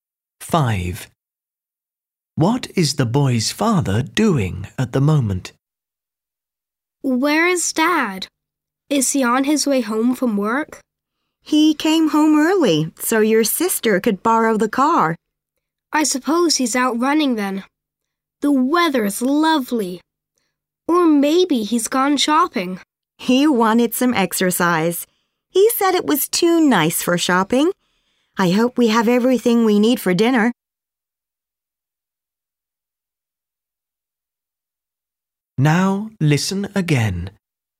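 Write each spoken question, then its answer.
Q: What is the boy's father doing at the moment?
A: running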